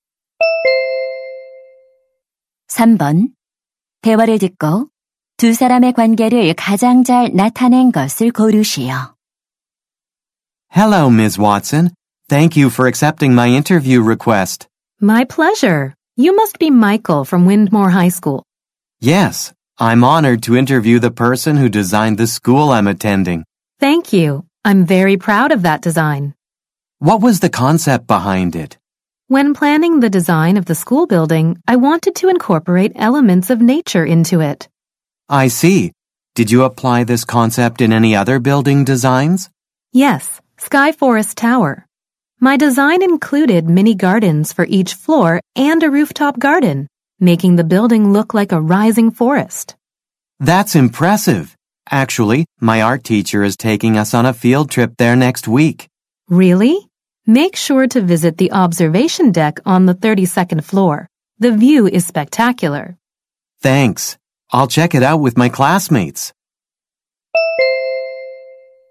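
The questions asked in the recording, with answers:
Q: 대화를 듣고 두 사람의 관계를 가장 잘 나타낸 것을 고르시오.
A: 건축가 - 학생 (인터뷰하는 학생)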